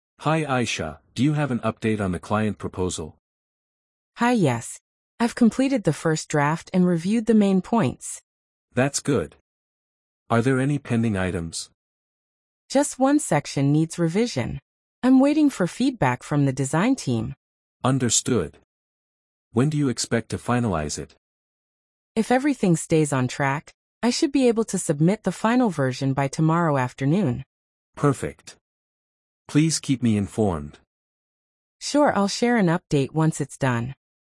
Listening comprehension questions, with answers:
Complete the phrases as you listen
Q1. Hi Ayesha, do you have an ______ on the client proposal?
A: update

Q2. I've completed the first ______ and reviewed the main points.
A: draft

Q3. Are there any ______ items?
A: pending

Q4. Just one section needs ______.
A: revision

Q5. I'm waiting ______ feedback from the design team.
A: for

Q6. When do you expect to ______ it?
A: finalize

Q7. Sure, I'll share an update ______ it's done.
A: once

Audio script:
Manager: Hi Ayesha, do you have an update on the client proposal?
Ayesha: Hi, yes. I've completed the first draft and reviewed the main points.
Manager: That's good. Are there any pending items?
Ayesha: Just one section needs revision. I'm waiting for feedback from the design team.
Manager: Understood. When do you expect to finalize it?
Ayesha: If everything stays on track, I should be able to submit the final version by tomorrow afternoon.
Manager: Perfect. Please keep me informed.
Perfect! "Sure, I'll share an update once it's done."